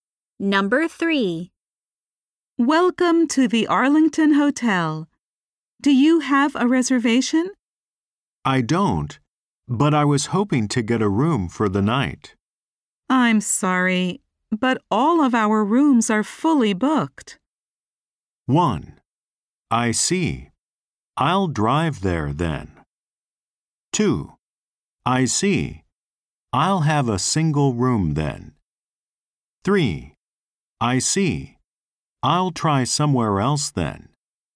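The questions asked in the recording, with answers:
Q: I'm sorry. But all of our rooms are fully booked.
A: 3: I see. I'll try somewhere else then.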